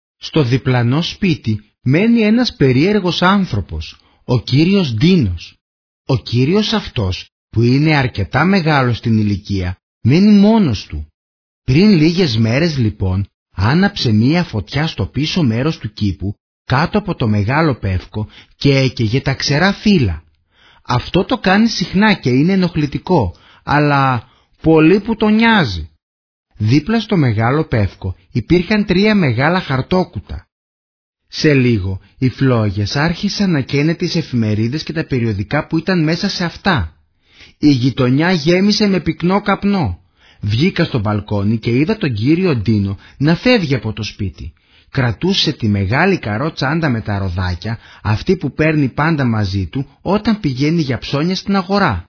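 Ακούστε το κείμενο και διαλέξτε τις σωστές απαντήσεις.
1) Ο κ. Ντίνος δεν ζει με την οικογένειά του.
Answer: ΣΩΣΤΟ

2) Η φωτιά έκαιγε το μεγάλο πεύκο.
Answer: ΛΑΘΟΣ

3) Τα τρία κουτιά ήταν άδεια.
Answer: ΛΑΘΟΣ

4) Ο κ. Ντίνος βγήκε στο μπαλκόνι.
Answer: ΛΑΘΟΣ

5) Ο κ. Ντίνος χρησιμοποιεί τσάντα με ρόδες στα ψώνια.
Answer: ΣΩΣΤΟ

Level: Επίπεδο Β1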